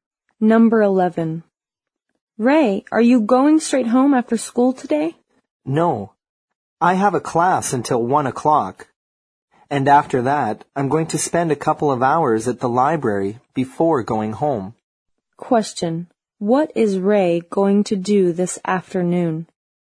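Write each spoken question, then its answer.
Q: What is Ray going to do this afternoon?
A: Attend a class until 1 o'clock, then study at the library for a couple of hours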